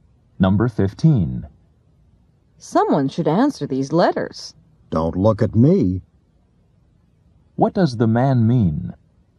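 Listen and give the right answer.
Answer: He won't answer the letters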